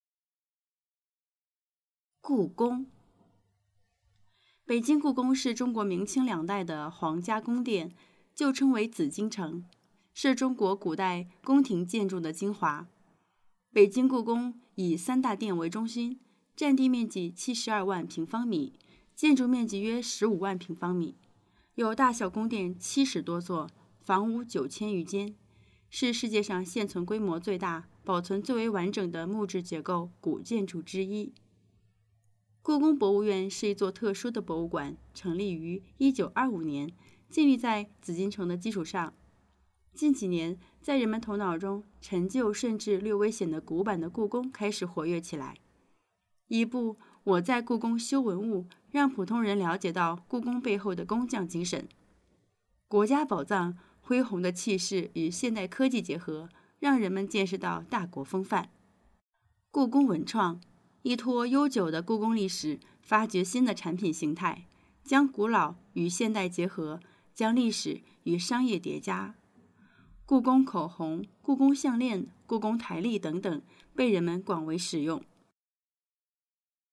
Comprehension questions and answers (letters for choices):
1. 根据短文,表示大致数量关系的词不包括什么?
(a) 部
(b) 余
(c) 多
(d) 约。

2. 下列关于故宫的说法正确的是?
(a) 故宫是唐朝的皇家宫殿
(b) 北京故宫不是一座博物馆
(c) 故宫文创物品受到人们的喜爱和使用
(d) <国家宝藏>是一部将中国历史和西方历史结合起来的纪录片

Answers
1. a
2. c

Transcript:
故宫 北京故宫是中国明清两代的皇家宫殿,旧称为紫禁城,是中国古代宫廷建筑的精华。北京故宫以三大殿为中心,占地面积72万平方米,建筑面积约15万平方米,有大小宫殿七十多座,房屋九千余间。是世界上现存规模最大、保存最为完整的木质结构古建筑之一。 故宫博物院是一座特殊的博物馆,成立于1925年,建立在紫禁城的基础上。近几年,在人们头脑中陈旧甚至略微显得古板的故宫开始活跃起来。一部《我在故宫修文物》让普通人了解到故宫背后的工匠精神,《 国家宝藏》恢弘的气势与现代科技结合,让人们见识到大国风范。 故宫文创,依托悠久的故宫历史,发掘新的产品形态,将古老与现代结合,将历史与商业叠加。故宫口红,故宫项链,故宫台历等等,被人们广为使用。

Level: advanced